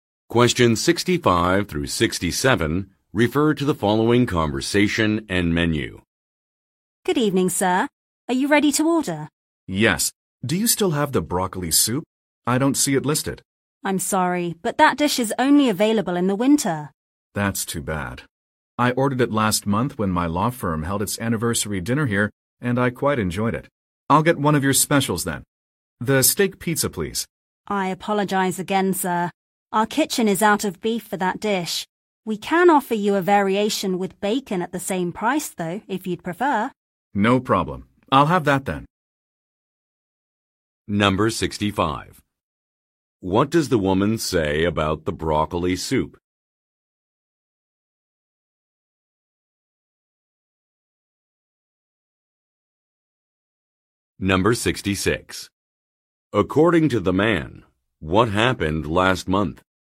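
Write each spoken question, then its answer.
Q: What does the woman say about the broccoli soup?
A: It is only available in the winter.

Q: According to the man, what happened last month?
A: His law firm held its anniversary dinner at the restaurant.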